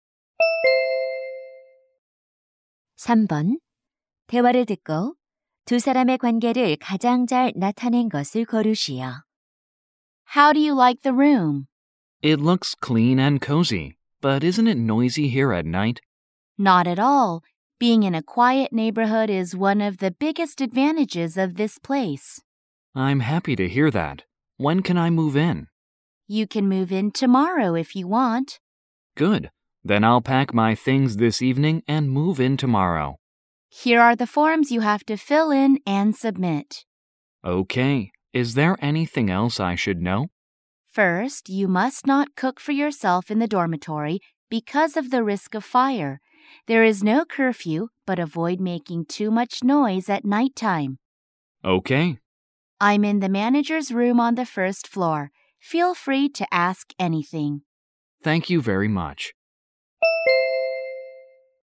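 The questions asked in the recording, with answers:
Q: 대화를 듣고 두 사람의 관계를 가장 잘 나타낸 것을 고르시오.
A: 기숙사 관리인 - 입주 학생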